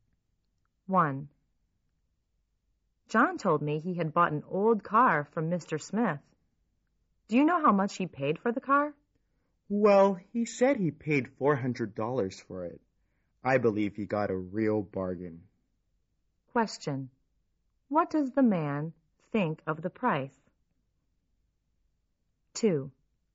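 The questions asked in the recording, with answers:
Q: What does the man think of the price?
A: It was a real bargain (cheap).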